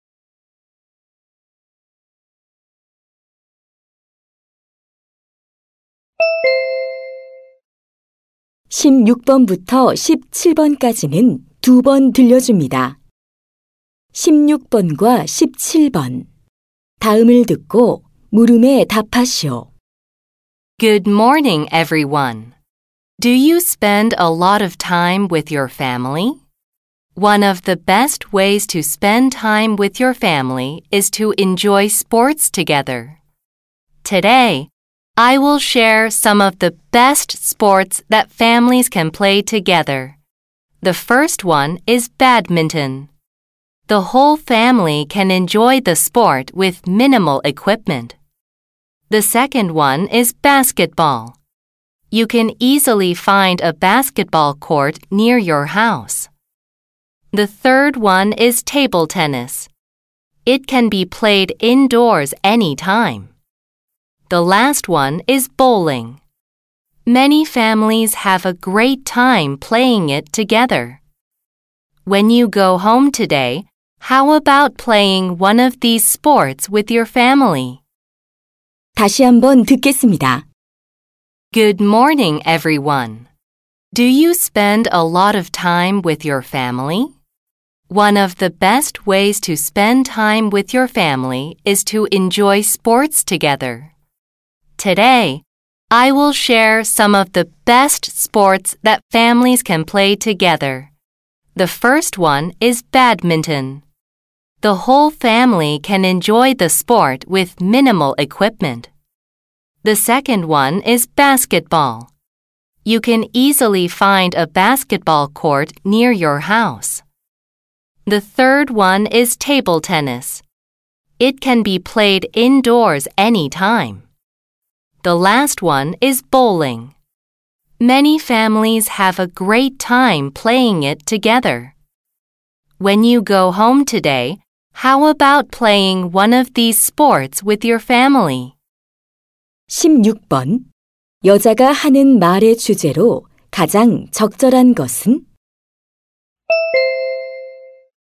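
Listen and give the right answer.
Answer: 가족이 함께 즐길 수 있는 스포츠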